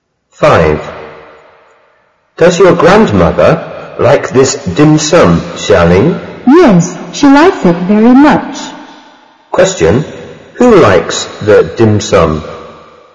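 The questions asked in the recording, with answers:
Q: Who likes the dim sum?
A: Xiaoling's grandmother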